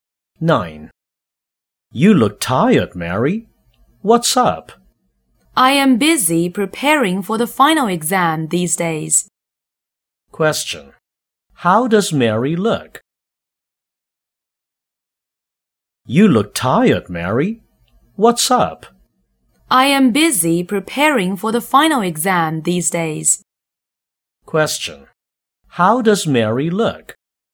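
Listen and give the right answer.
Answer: Tired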